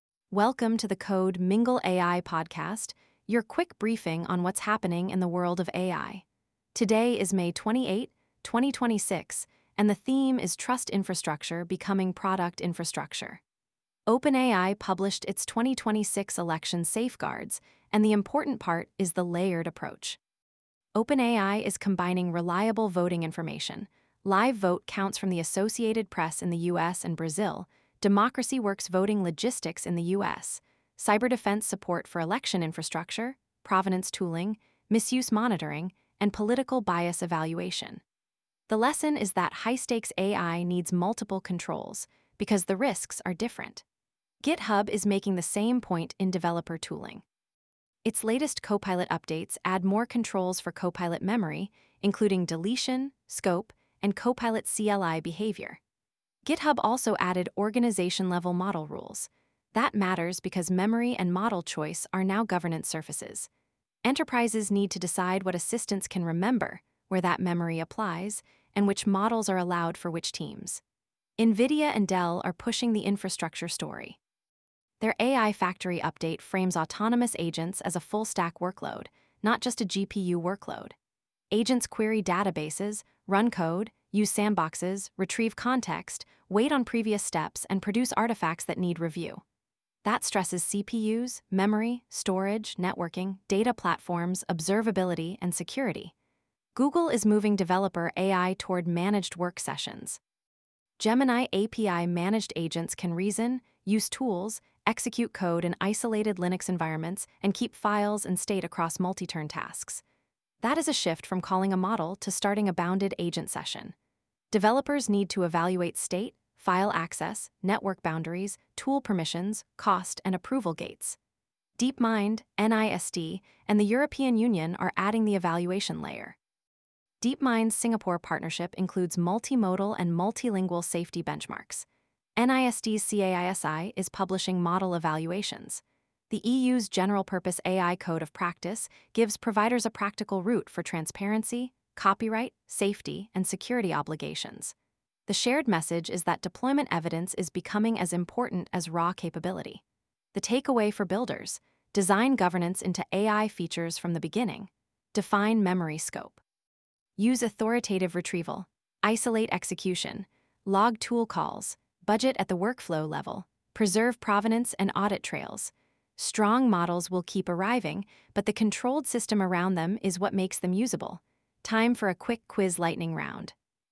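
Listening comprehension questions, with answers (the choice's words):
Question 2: Why are GitHub's Copilot Memory and model-rule updates important for enterprises?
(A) They make governance unnecessary.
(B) They provide controls over what assistants remember and which models organizations can use.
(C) They remove pull requests from software development.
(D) They force every team to use the same model.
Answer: They provide controls over what assistants remember and which models organizations can use.

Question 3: What does NVIDIA's Dell AI Factory update imply about agent infrastructure?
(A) Agentic AI is only a GPU purchasing problem.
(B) Agent workflows stress the full stack, including CPUs, data platforms, networking, sandboxes, and observability.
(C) Agents do not need enterprise data access.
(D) On-premises AI cannot support autonomous agents.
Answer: Agent workflows stress the full stack, including CPUs, data platforms, networking, sandboxes, and observability.

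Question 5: Why do DeepMind, NIST, and EU evaluation efforts matter for builders?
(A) They show that deployment evidence is becoming as important as benchmark scores.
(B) They prove English-only evaluations are sufficient.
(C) They eliminate the need for product-specific testing.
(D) They apply only to academic research.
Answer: They show that deployment evidence is becoming as important as benchmark scores.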